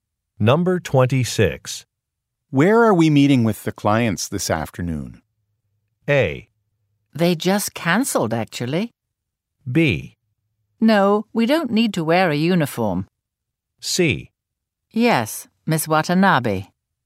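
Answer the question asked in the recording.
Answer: A: They just cancelled, actually.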